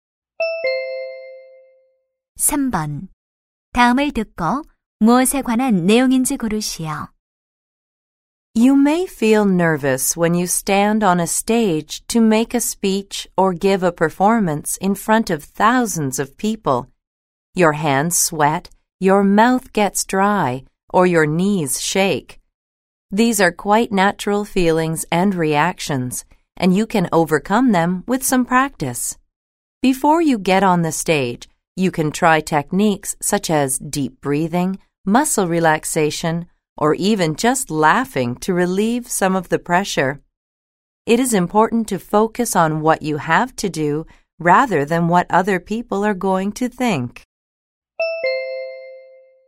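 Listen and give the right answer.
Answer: 무대 공포증(긴장)을 극복하는 방법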